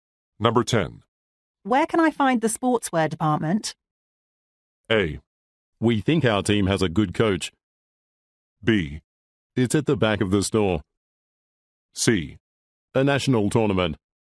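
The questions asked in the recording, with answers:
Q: Where can I find the sportswear department?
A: B: It's at the back of the store.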